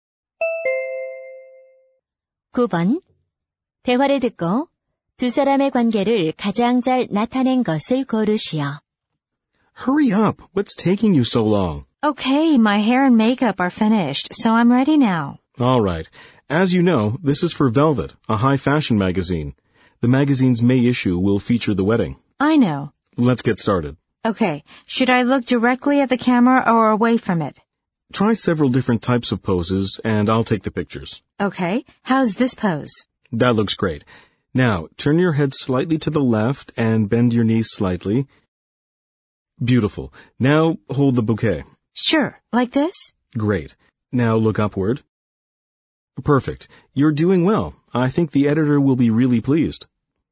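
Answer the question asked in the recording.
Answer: 사진작가와 모델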